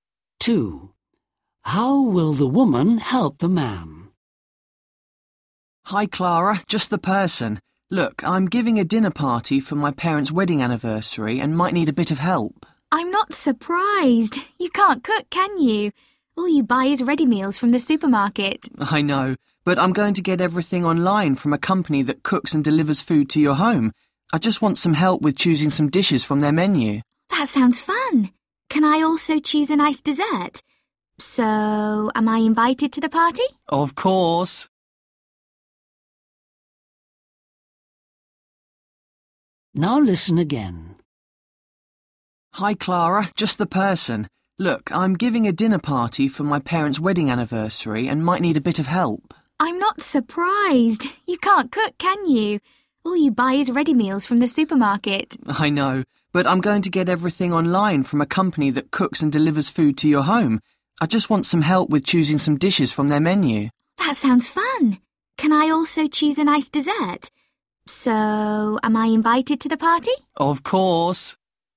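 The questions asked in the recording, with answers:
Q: How will the woman help the man?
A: by helping him choose dishes from an online menu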